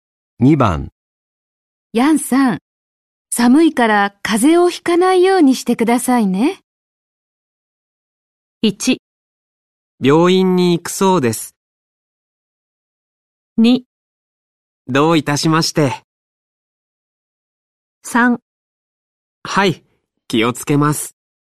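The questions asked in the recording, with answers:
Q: ヤンさん、寒いから風邪をひかないようにしてくださいね。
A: 3: はい、気をつけます。

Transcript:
1
病院に行くそうです。
2
どういたしまして。
3
はい、気をつけます。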